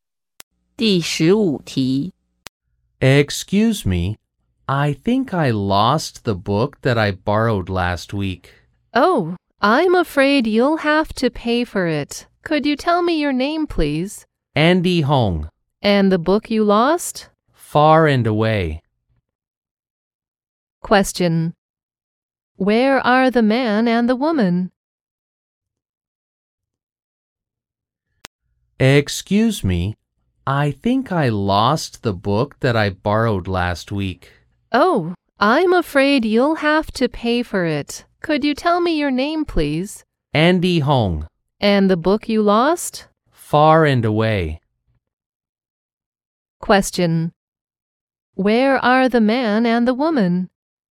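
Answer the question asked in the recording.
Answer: In a library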